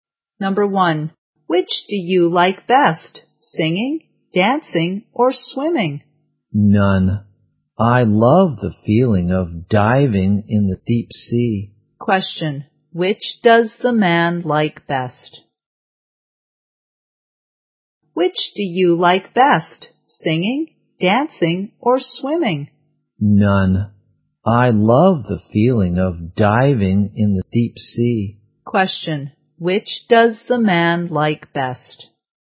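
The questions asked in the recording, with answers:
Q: Which does the man like best?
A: Diving.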